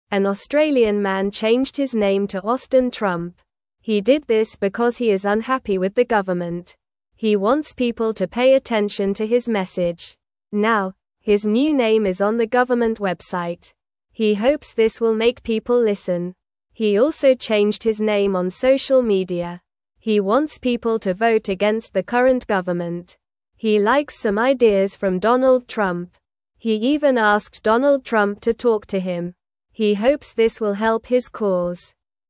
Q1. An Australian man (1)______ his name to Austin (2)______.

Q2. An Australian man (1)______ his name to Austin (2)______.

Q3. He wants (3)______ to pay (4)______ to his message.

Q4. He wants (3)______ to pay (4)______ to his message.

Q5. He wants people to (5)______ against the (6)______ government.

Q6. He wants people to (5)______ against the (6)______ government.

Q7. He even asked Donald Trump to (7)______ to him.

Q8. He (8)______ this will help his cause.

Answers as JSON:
{"1": "changed", "2": "Trump", "3": "people", "4": "attention", "5": "vote", "6": "current", "7": "talk", "8": "hopes"}

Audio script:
An Australian man changed his name to Austin Trump. He did this because he is unhappy with the government. He wants people to pay attention to his message. Now, his new name is on the government website. He hopes this will make people listen.
He also changed his name on social media. He wants people to vote against the current government. He likes some ideas from Donald Trump. He even asked Donald Trump to talk to him. He hopes this will help his cause.

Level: Level 1